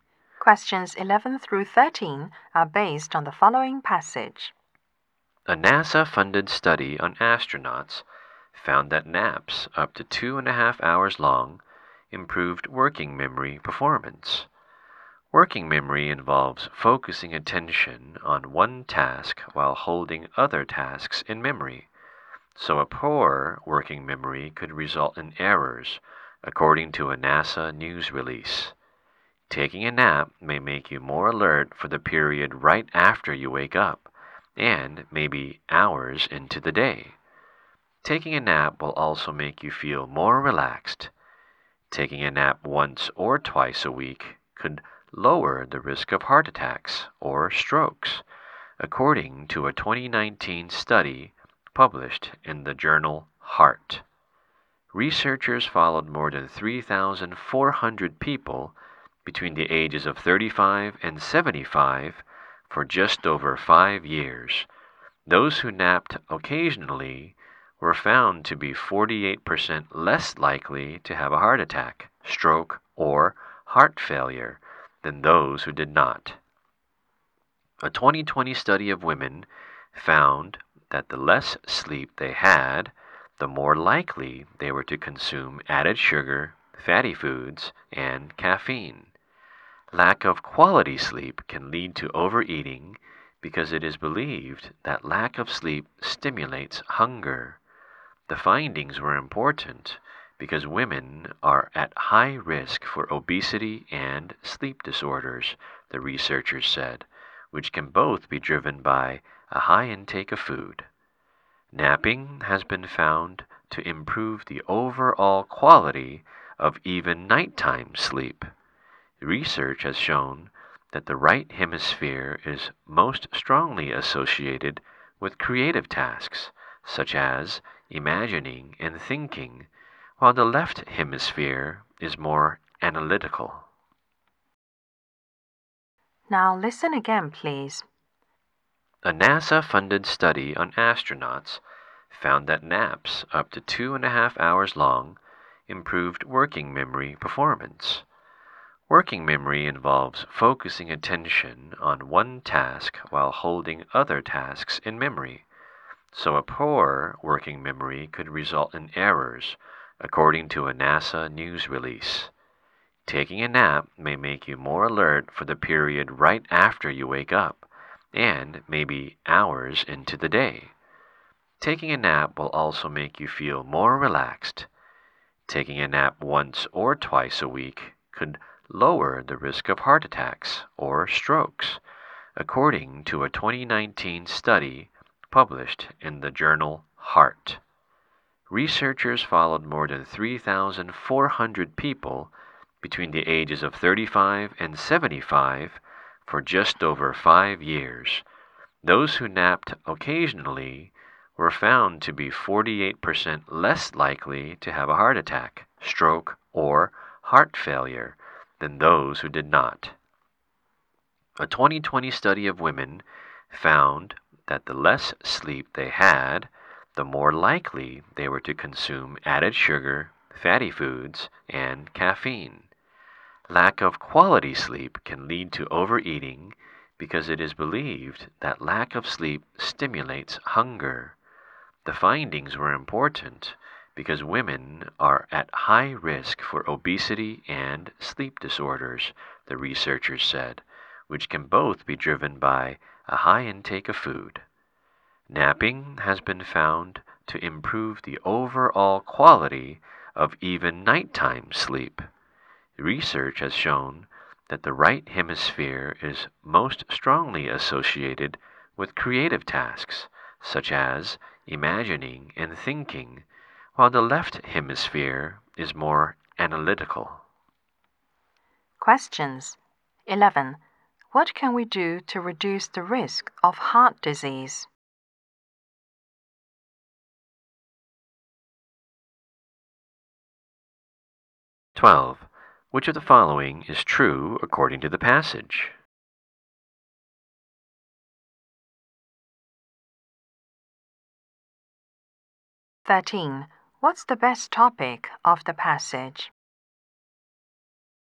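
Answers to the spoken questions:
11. Take a nap once or twice a week.
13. The benefits of napping.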